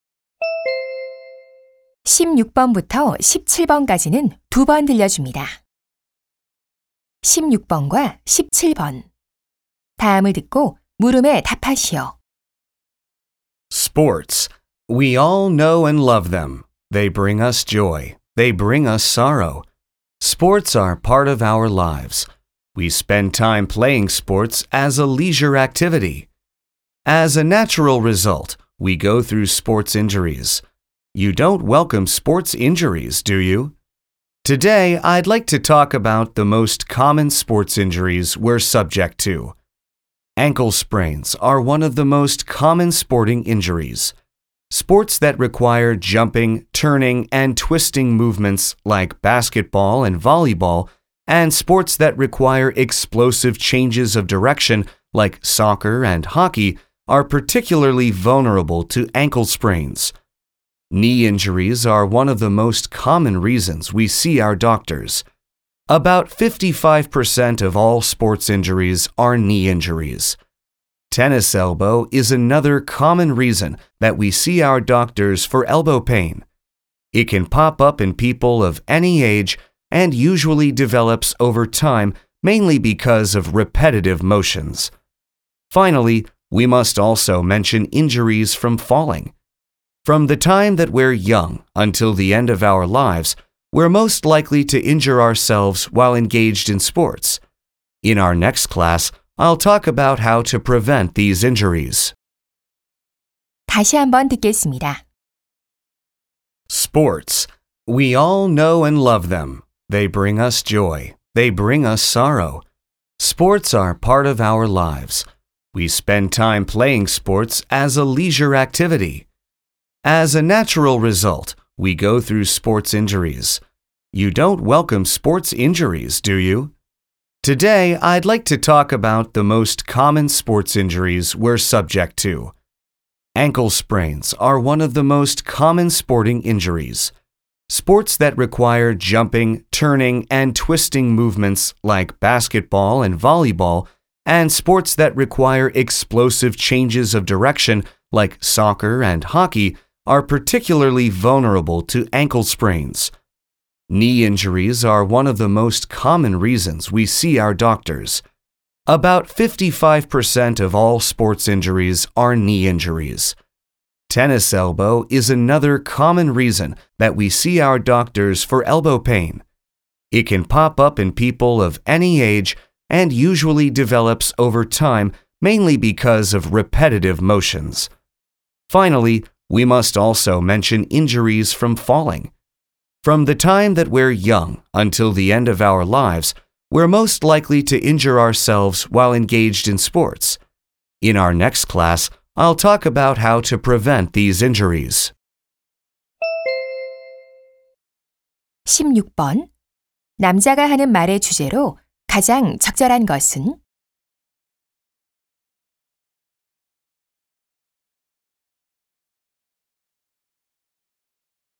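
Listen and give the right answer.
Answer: 가장 흔한 스포츠 부상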